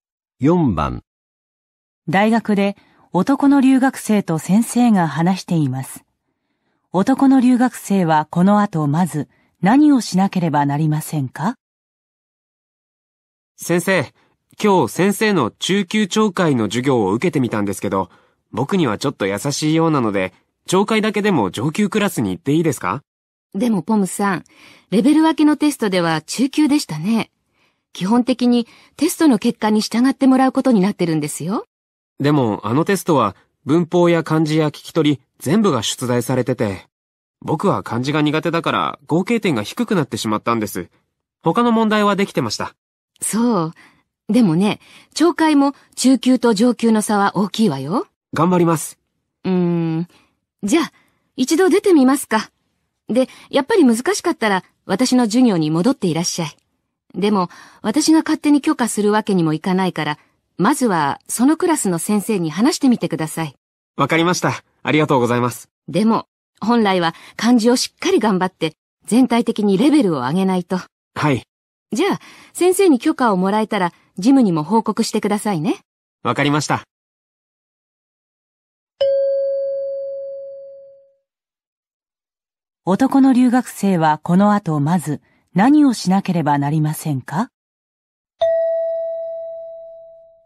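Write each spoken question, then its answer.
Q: 男の留学生はこの後まず何をしなければなりませんか?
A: 上級クラスの先生に話して許可をもらう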